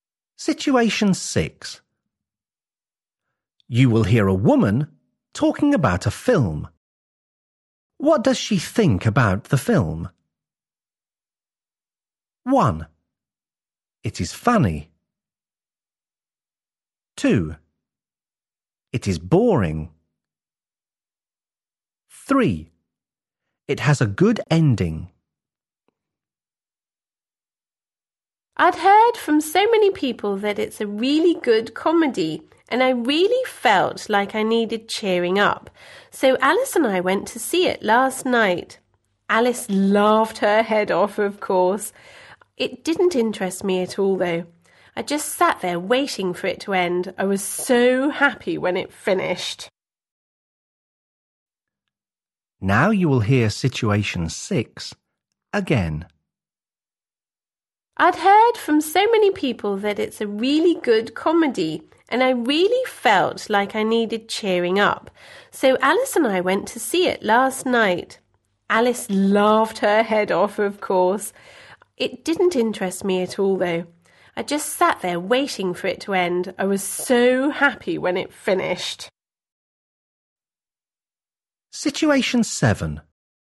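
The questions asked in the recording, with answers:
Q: What does she think about the film?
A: 2: It is boring.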